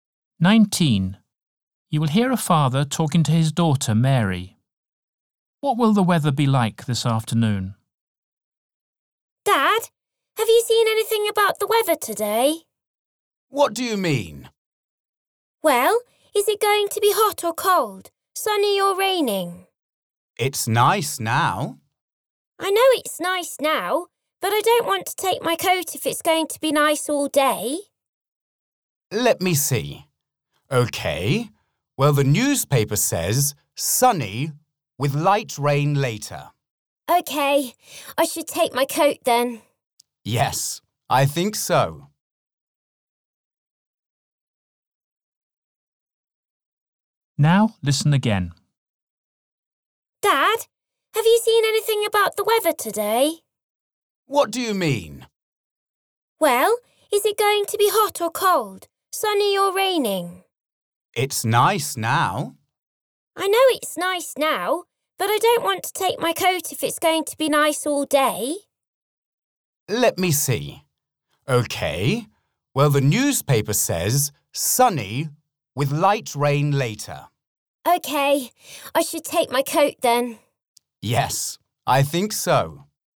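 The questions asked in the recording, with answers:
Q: What will the weather be like this afternoon?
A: Sunny with light rain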